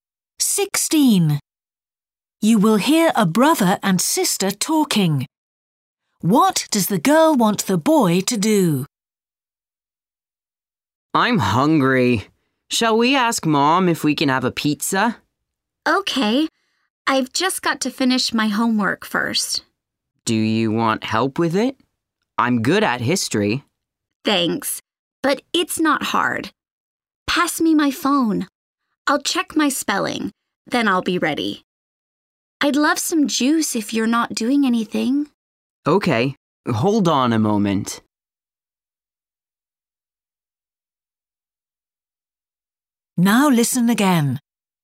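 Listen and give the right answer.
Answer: Get her some juice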